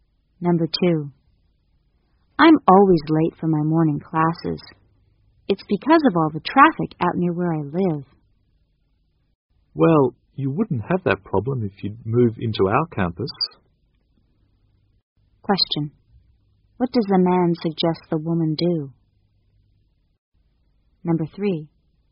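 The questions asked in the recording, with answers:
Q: What does the man suggest the woman do?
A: Move onto the campus.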